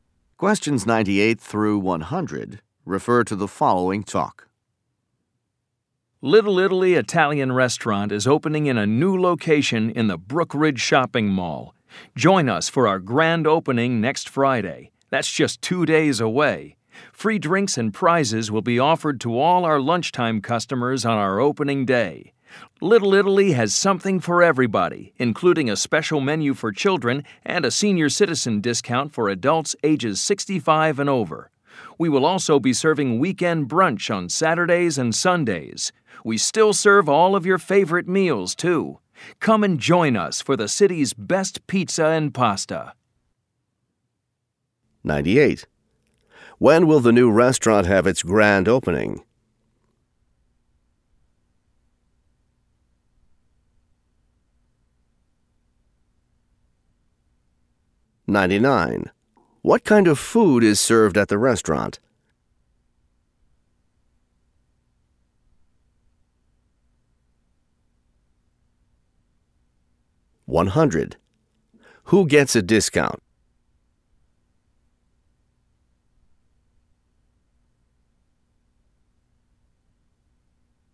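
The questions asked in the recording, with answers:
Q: When will the new restaurant have its grand opening?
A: Next Friday

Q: What kind of food is served at the restaurant?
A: Italian

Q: Who gets a discount?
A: Senior citizens aged 65 and over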